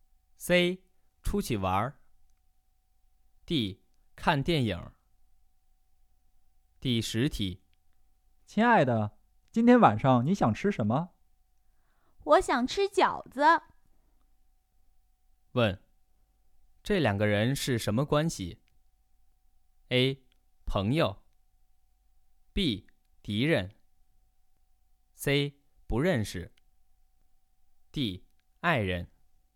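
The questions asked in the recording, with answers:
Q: 问,这两个人是什么关系?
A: D: 爱人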